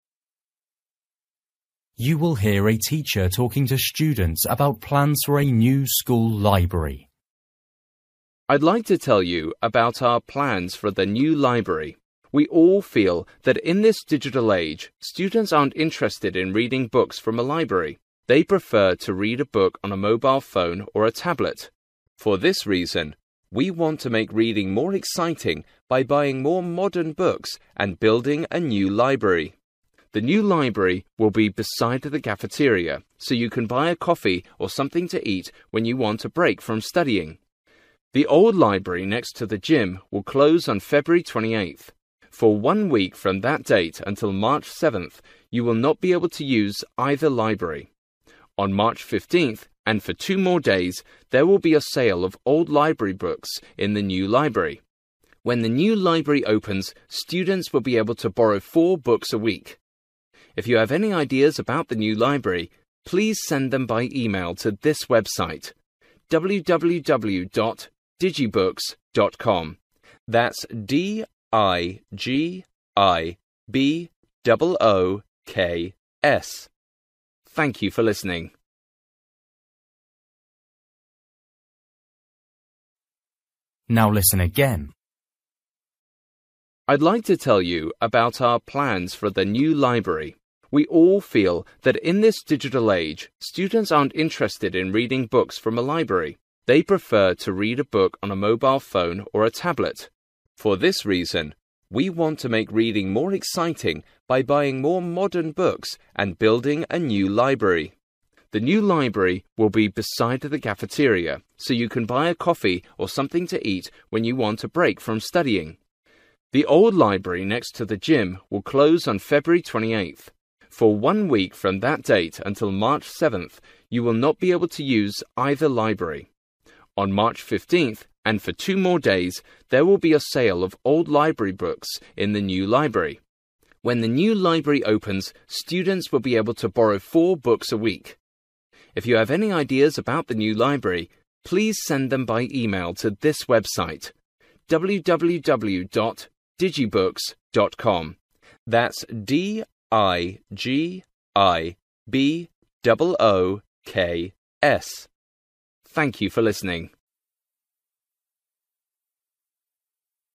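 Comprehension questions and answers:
For each question, write the correct answer in the gap. Write one word or a number or a date or a time.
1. Library next to:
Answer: cafeteria

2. Library not available until:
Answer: March 7th

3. Number of days for books sale:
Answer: 3

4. Books to borrow weekly:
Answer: 4

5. Send ideas to: (5) www. .com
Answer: digibooks

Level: Luyện nghe trình độ A2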